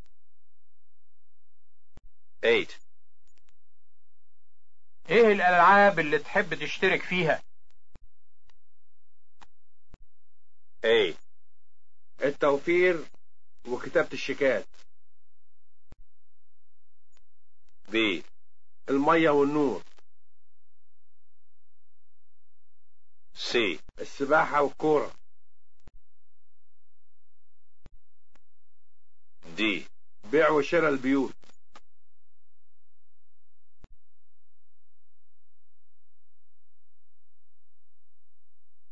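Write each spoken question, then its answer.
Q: ايه الالعاب اللي تحب تشترك فيها؟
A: C: السباحة والكورة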